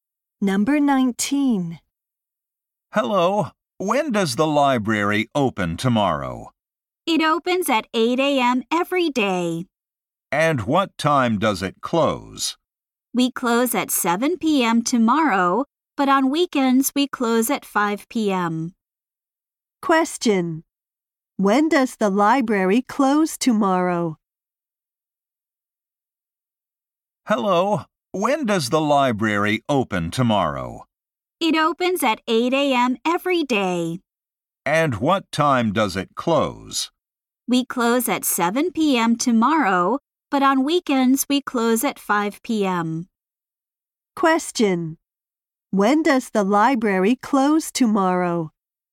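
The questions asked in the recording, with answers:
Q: When does the library close tomorrow?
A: At 7 p.m.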